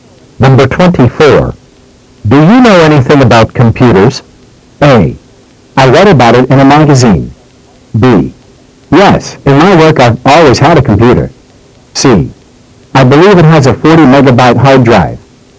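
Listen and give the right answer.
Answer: B: Yes, in my work I've always had a computer.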